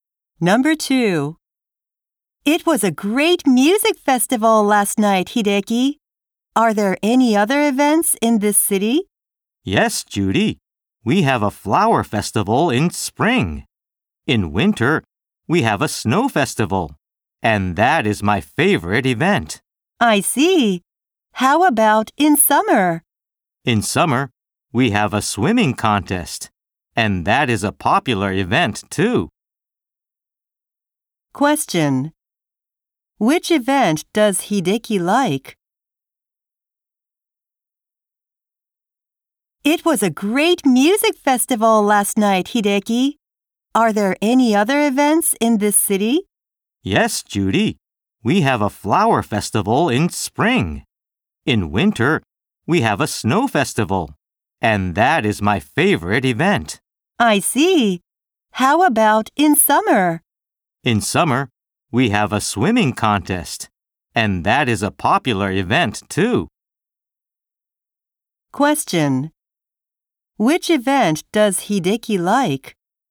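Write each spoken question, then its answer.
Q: Question. Which event does Hideki like?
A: The snow festival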